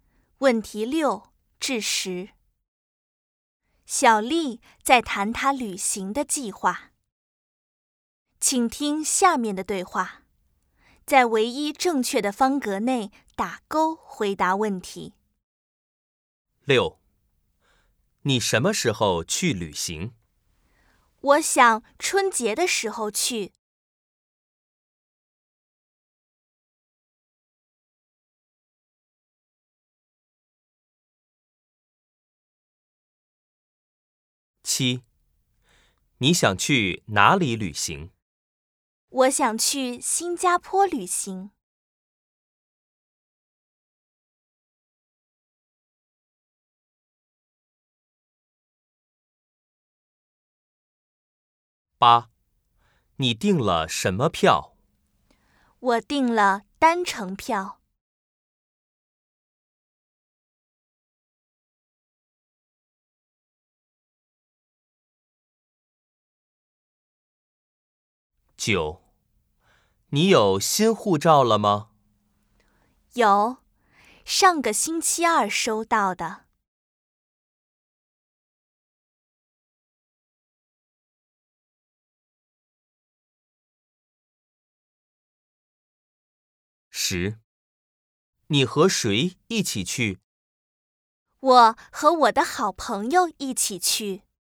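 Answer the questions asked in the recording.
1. 春节的时候
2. 新加坡
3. 单程票
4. 有,上个星期二收到的
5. 和她的好朋友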